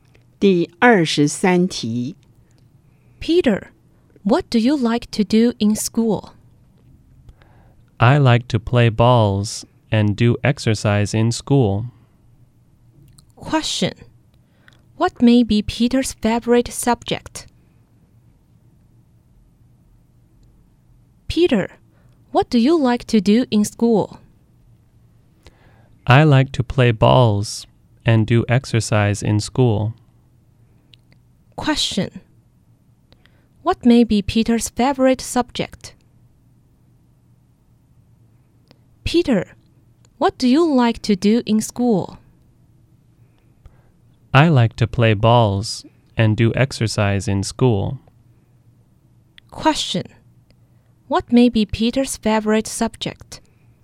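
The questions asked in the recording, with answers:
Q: Question. What may be Peter's favorite subject?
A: PE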